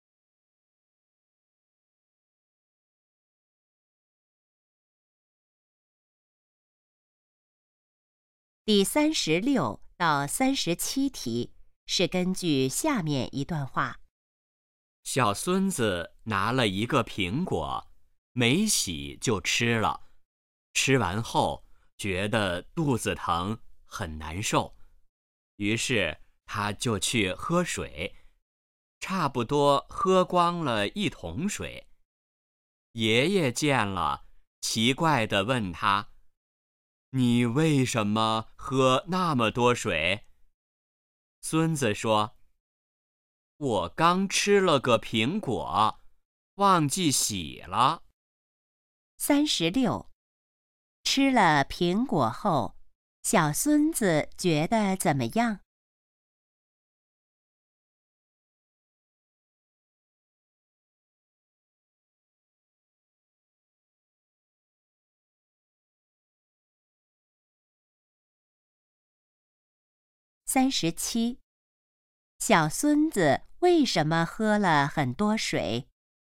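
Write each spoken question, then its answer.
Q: 吃了苹果后,小孙子觉得怎么样?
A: 肚子疼

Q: 小孙子为什么喝了很多水?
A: 吃苹果忘记洗了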